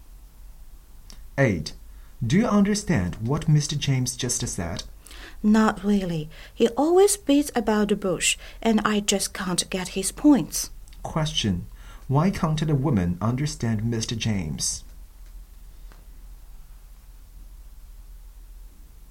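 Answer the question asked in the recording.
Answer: He doesn't get to the point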